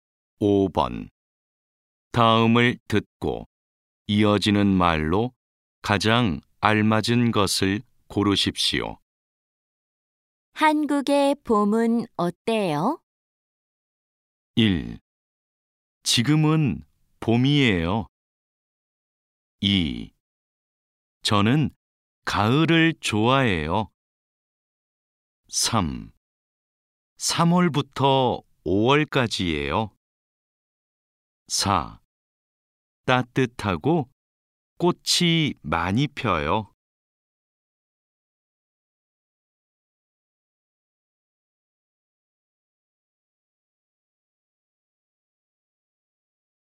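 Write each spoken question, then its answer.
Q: 한국의 봄은 어때요?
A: 4: 따뜻하고 꽃이 많이 펴요.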